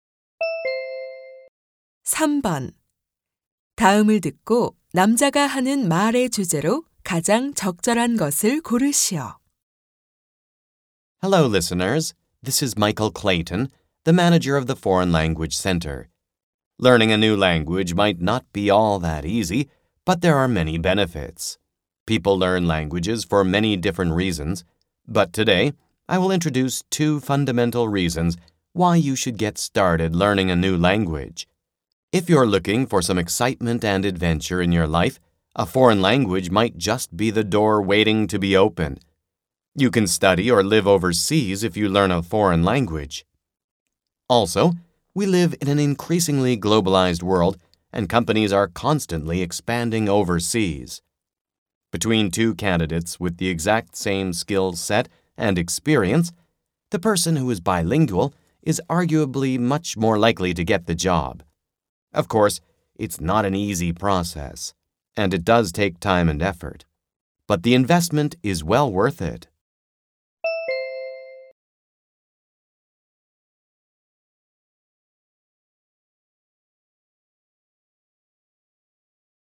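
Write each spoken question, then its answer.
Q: 다음을 듣고 남자가 하는 말의 주제로 가장 적절한 것을 고르시오.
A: 외국어를 배워야 하는 이유(이점)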